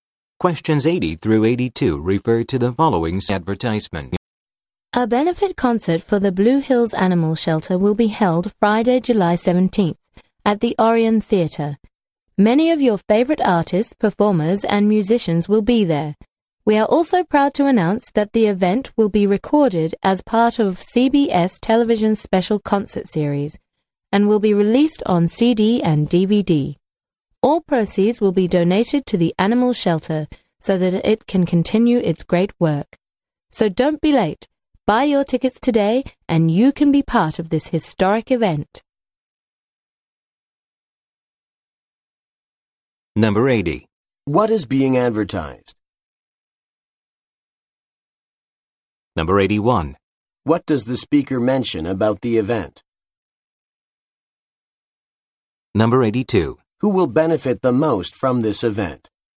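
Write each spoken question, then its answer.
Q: What is being advertised?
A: A benefit concert

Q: What does the speaker mention about the event?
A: It will be recorded for a CBS TV special and released on CD and DVD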